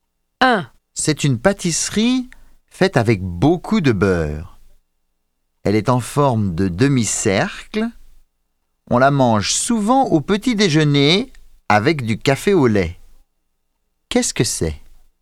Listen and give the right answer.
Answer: C'est un croissant.